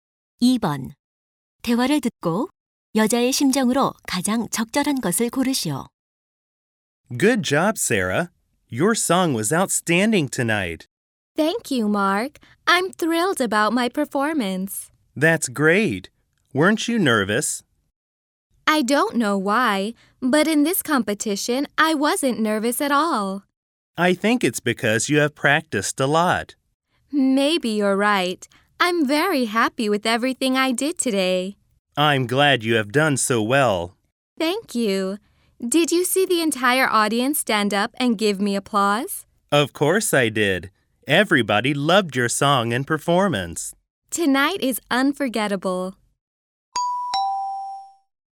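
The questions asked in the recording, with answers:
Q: 대화를 듣고 여자의 심정으로 가장 적절한 것을 고르시오.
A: 기쁘고 뿌듯함 (pleased, proud)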